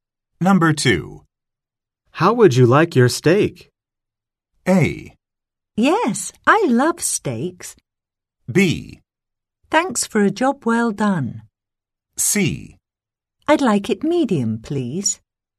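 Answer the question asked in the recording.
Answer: C: I'd like it medium, please.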